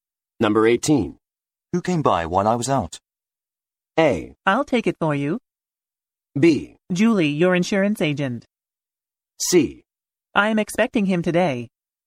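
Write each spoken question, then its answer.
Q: Who came by while I was out?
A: B: Julie, your insurance agent.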